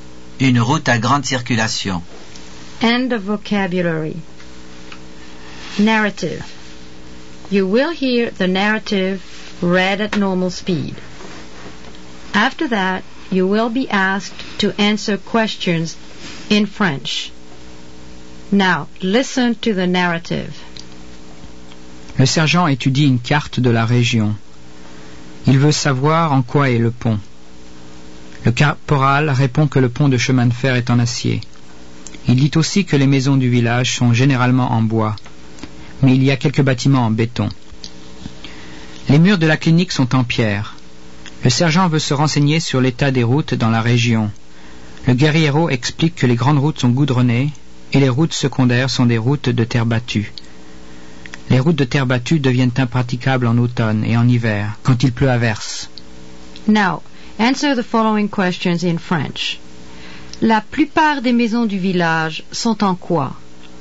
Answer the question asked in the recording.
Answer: La plupart des maisons du village sont en bois.